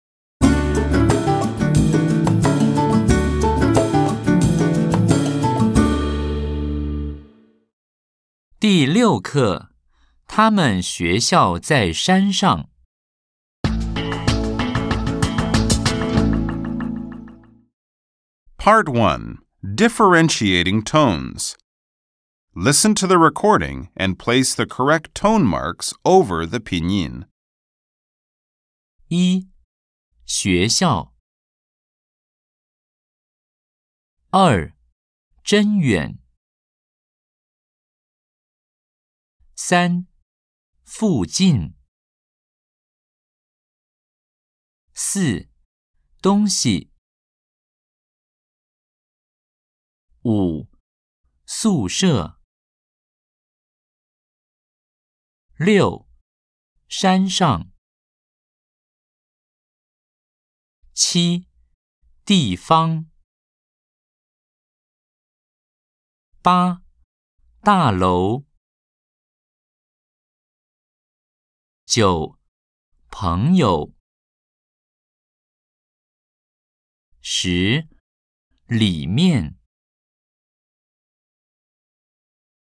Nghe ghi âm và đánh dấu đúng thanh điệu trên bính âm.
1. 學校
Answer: xuéxiào

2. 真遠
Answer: zhēn yuǎn

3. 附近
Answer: fùjìn

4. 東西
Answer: dōngxi

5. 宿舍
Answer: sùshè

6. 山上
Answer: shānshàng

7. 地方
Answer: dìfang

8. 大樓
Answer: dàlóu

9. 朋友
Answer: péngyou

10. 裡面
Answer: lǐmiàn